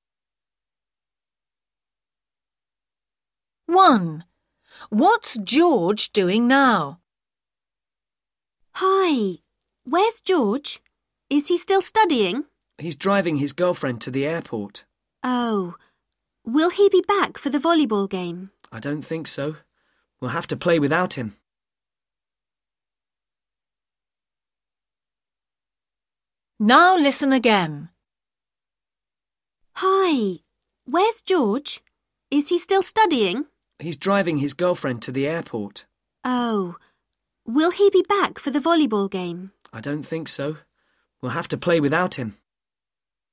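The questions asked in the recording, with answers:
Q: What's George doing now?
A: driving his girlfriend to the airport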